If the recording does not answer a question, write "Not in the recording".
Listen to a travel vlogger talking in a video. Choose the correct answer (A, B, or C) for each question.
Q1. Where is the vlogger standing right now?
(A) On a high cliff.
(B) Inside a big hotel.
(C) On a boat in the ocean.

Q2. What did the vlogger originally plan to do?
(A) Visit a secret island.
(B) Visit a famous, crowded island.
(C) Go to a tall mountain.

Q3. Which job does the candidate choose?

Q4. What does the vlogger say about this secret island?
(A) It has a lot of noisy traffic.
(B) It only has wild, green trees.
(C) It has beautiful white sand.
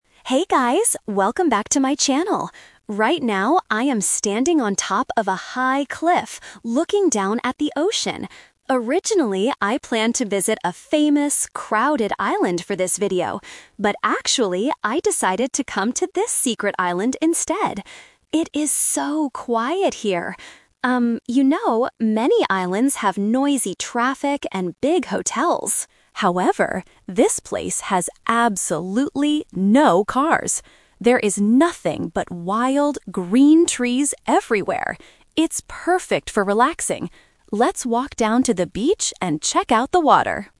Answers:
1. A
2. B
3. Not in the recording
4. B

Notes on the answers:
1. Why A is correct: The vlogger clearly says at the beginning: "Right now, I am standing on top of a high cliff..." Why B is a trap: "Big hotels" are mentioned in the audio, but they are on other islands, not where the vlogger is standing. Why C is wrong: A boat is a very common transport for islands, but it is never mentioned in this video.
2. Why B is correct: The vlogger uses the past tense to state the first plan: "Originally, I planned to visit a famous, crowded island..." Why A is a trap: The "secret island" is where the vlogger is right now because of a change of plans (The A2 Twist). Why C is wrong: A mountain is a geographical feature, but it is not mentioned in the audio.
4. Why B is correct: The vlogger describes the island by saying: "There is nothing but wild, green trees everywhere." Why A is a trap: The vlogger mentions "noisy traffic", but uses the word "However" to contrast it, saying this island has "no cars". Why C is wrong: White sand is a plausible feature of a beach, but it is not spoken about in the script.

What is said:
Vlogger: Hey guys, welcome back to my channel! Right now, I am standing on top of a high cliff, looking down at the ocean. Originally, I planned to visit a famous, crowded island for this video. But actually, I decided to come to this secret island instead. It is so quiet here! Um, you know, many islands have noisy traffic and big hotels. However, this place has absolutely no cars. There is nothing but wild, green trees everywhere. It's perfect for relaxing. Let's walk down to the beach and check out the water!

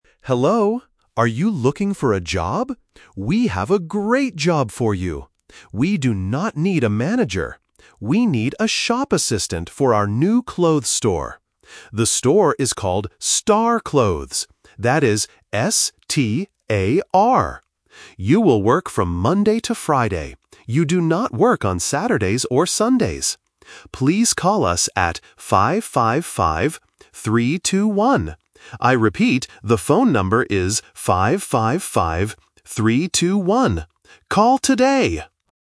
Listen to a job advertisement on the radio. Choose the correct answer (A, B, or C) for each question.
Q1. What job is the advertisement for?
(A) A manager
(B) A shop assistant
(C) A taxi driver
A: B

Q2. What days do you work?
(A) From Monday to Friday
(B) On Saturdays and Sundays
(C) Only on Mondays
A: A

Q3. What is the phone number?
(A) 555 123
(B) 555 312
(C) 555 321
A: C

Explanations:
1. The announcer clearly says: "We need a shop assistant." Option (A) is the trap because the word "manager" is mentioned, but the announcer rejects it by saying "We do not need a manager." Option (C) is not mentioned in the audio.
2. The announcer says: "You will work from Monday to Friday." Option (B) is a trap because the weekend days are mentioned, but the announcer states "You do not work on Saturdays or Sundays." Option (C) is incomplete and incorrect.
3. The announcer reads and repeats the number very clearly: "5-5-5, 3-2-1." Options (A) and (B) use the same numbers but in the wrong order to test the listener's accuracy.

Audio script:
Announcer: Hello! Are you looking for a job? We have a great job for you! We do not need a manager. We need a shop assistant for our new clothes store. The store is called Star Clothes. That is S-T-A-R. You will work from Monday to Friday. You do not work on Saturdays or Sundays.

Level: A1

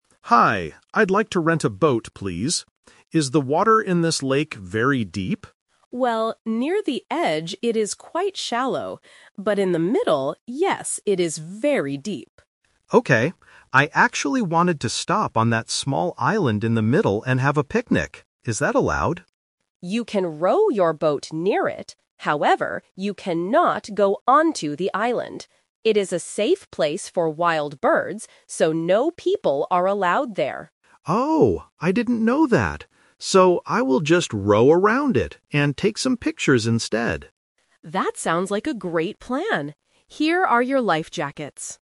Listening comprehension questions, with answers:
Listen to the conversation between a tourist and a boat rental agent. Choose the correct answer (A, B, or C) for each question.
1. What does the agent say about the water in the middle of the lake?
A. It is very shallow.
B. It is very deep.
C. It is too dangerous.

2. What did the tourist originally plan to do on the island?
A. Take some pictures.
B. Look at the wild birds.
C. Have a picnic.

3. What will the tourist do instead?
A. Row around the island.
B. Go onto the island quickly.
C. Walk along the edge of the lake.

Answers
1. B
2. C
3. A

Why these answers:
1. Why B is correct: The agent clearly answers, "But in the middle, yes, it is very deep." Why A is a trap: The agent mentions the word "shallow", but that is only true for the water "near the edge", not in the middle. Why C is wrong: The word "dangerous" is never mentioned in the conversation.
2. Why C is correct: The tourist states his original plan: "I actually wanted to stop on that small island in the middle and have a picnic." Why A is a trap: "Take some pictures" is what he decides to do at the end, after his plan changes. Why B is wrong: The agent mentions wild birds, but the tourist did not plan to look at them.
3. Why A is correct: Because he cannot go onto the island, he changes his mind and says, "So, I will just row around it and take some pictures instead." (The A2 Twist). Why B is a trap: The agent strictly says, "you cannot go onto the island." Why C is wrong: He is still renting a boat to row on the lake; he is not going to walk.

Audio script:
Tourist: Hi, I'd like to rent a boat, please. Is the water in this lake very deep?
Agent: Well, near the edge it is quite shallow. But in the middle, yes, it is very deep.
Tourist: Okay. I actually wanted to stop on that small island in the middle and have a picnic. Is that allowed?
Agent: You can row your boat near it. However, you cannot go onto the island. It is a safe place for wild birds, so no people are allowed there.
Tourist: Oh, I didn't know that. So, I will just row around it and take some pictures instead.

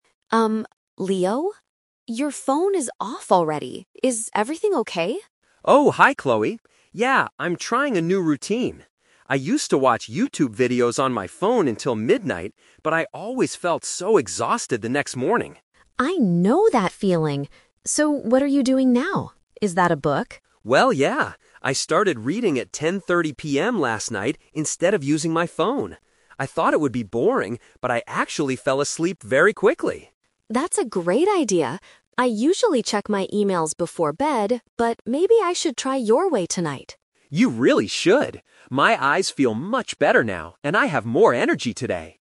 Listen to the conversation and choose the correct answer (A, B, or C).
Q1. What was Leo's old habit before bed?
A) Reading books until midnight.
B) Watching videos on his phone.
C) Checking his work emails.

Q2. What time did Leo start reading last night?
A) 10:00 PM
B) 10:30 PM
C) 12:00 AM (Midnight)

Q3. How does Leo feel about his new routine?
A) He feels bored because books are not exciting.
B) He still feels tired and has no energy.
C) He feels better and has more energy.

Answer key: 1B, 2B, 3C

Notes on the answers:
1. Leo says "I used to watch YouTube videos on my phone until midnight." Option A is a trap because reading is his new habit. Option C is Chloe's current habit, not Leo's.
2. Leo clearly mentions "I started reading at 10:30 PM last night." Option C (Midnight) is a trap because that was when he used to stop using his phone in the past.
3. Leo says "My eyes feel much better now, and I have more energy today." Option A is a trap because he thought it would be boring, but it actually helped him sleep. Option B is wrong because that was how he felt with his old habit.

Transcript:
Chloe: Um, Leo? Your phone is off already. Is everything okay?
Leo: Oh, hi Chloe. Yeah, I'm trying a new routine. I used to watch YouTube videos on my phone until midnight, but I always felt so exhausted the next morning.
Chloe: I know that feeling! So, what are you doing now? Is that a book?
Leo: Well, yeah. I started reading at 10:30 PM last night instead of using my phone. I thought it would be boring, but I actually fell asleep very quickly!
Chloe: That's a great idea. I usually check my emails before bed, but maybe I should try your way tonight.
Leo: You really should! My eyes feel much better now, and I have more energy today.

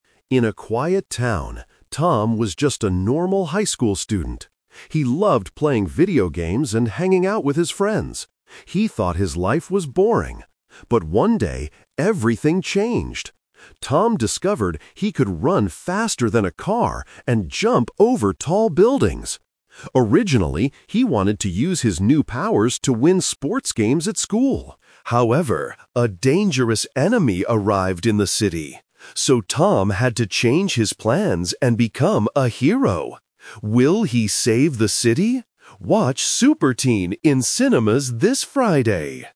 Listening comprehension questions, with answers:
Listen to the movie trailer and choose the correct answer (A, B, or C) for each question.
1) What is Tom's special power?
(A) He can fly over buildings.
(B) He can run very fast.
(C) He can lift a heavy car.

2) What did Tom originally want to do with his powers?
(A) Save the city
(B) Become a famous superhero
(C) Win sports games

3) Why did Tom decide to become a hero?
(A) Because a dangerous enemy arrived.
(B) Because his friends asked him to help.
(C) Because his school was on fire.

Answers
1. B
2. C
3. A

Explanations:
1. The trailer says Tom can "run faster than a car." Option A is the trap because he can "jump" over buildings, not "fly." Option C is the trap because the word "car" is mentioned, but he runs faster than it; he doesn't lift it.
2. The voice-over explicitly says, "Originally, he wanted to use his new powers to win sports games at school." Option A is the trap because saving the city is what he does later, not his original plan. Option B is not mentioned.
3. Tom wanted to use his powers for sports, "However, a dangerous enemy arrived in the city. So, Tom had to change his plans and become a hero." Options B and C are plausible reasons for a superhero movie, but they are not mentioned in the audio.

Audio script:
Voice-over: In a quiet town, Tom was just a normal high school student. He loved playing video games and hanging out with his friends. He thought his life was boring. But one day, everything changed. Tom discovered he could run faster than a car and jump over tall buildings! Originally, he wanted to use his new powers to win sports games at school. However, a dangerous enemy arrived in the city. So, Tom had to change his plans and become a hero. Will he save the city? Watch Super Teen in cinemas this Friday!

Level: A2

